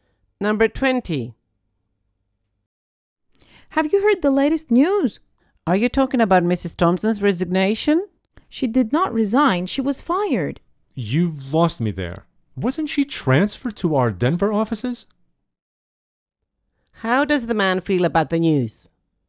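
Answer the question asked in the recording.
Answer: Confused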